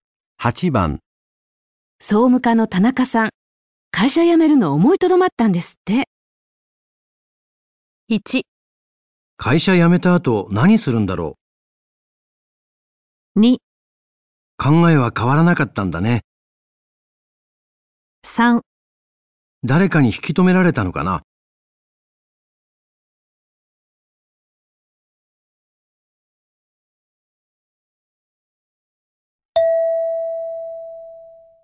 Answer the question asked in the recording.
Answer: 3

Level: N2 Listening · Test 3